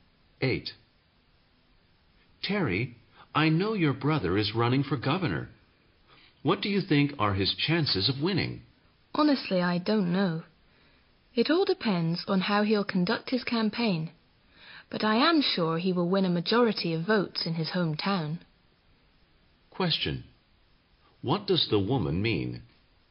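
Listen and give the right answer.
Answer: She isn't sure her brother will win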